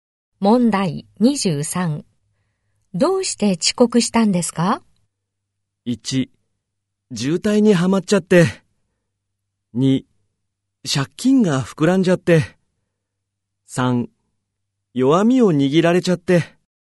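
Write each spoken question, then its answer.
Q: どうして遅刻したんですか?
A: 1: 渋滞にはまっちゃって。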